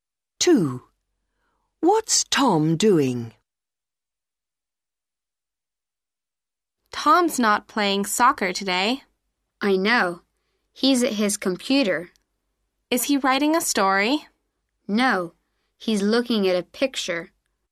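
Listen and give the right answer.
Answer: Looking at a picture on his computer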